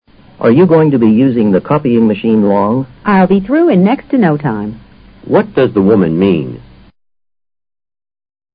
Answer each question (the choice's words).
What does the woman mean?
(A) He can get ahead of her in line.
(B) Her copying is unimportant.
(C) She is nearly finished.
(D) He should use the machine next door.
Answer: She is nearly finished.

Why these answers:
be through 与be finished同义。In next to no time = in nearly no time, 意思是"马上"、"即刻"。全句的意思与C是相同的。copying machine: 复印机。问句的意思是:你还要用复印机很长时间吗?be using 是进行时态的不定式形式,多用于口语中。